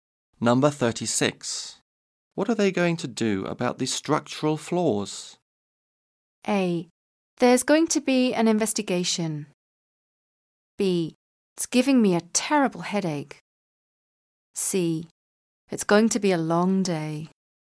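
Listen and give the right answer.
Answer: A: There's going to be an investigation.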